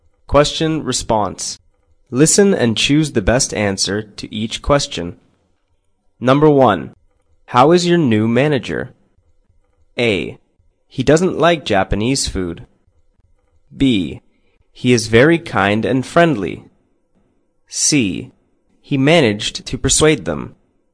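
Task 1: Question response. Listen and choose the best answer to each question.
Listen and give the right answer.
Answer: He is very kind and friendly.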